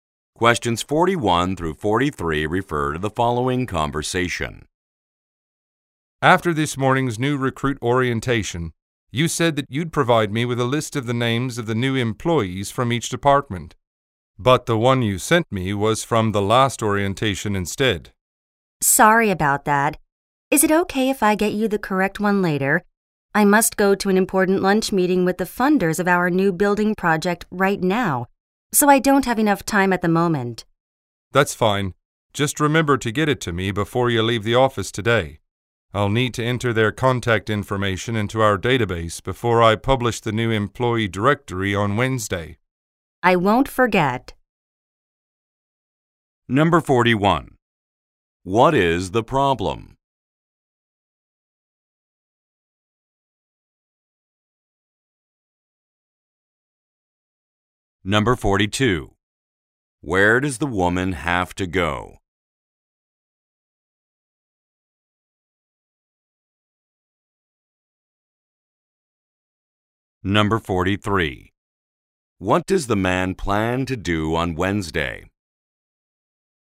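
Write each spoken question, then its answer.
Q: What is the problem?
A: The wrong employee list was sent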